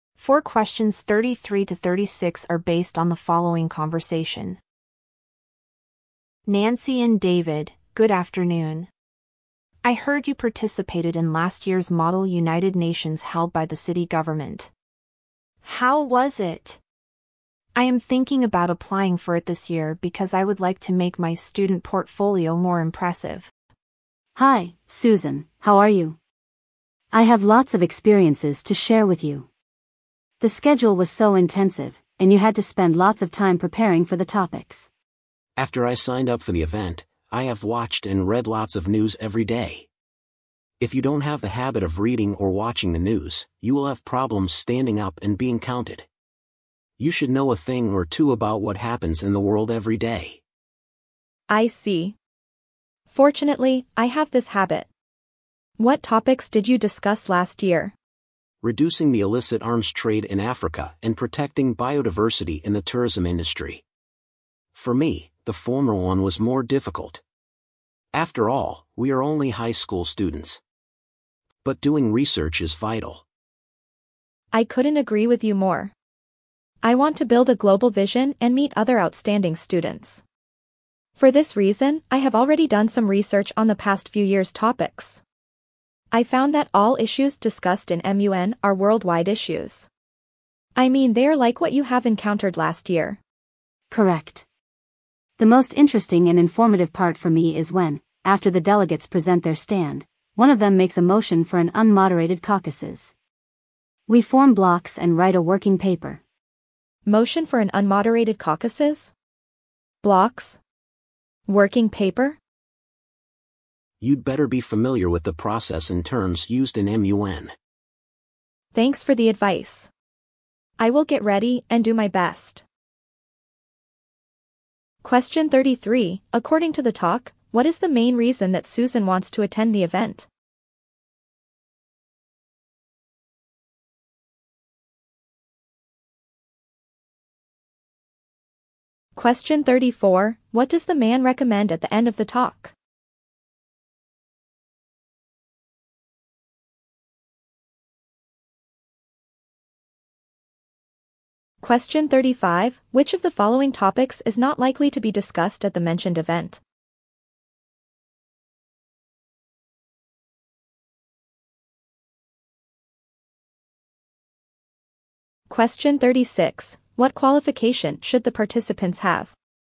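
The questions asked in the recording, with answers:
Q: According to the talk, what is the main reason that Susan wants to attend the event?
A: To make her student portfolio more impressive

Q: What does the man recommend at the end of the talk?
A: Being familiar with the process and terms used in MUN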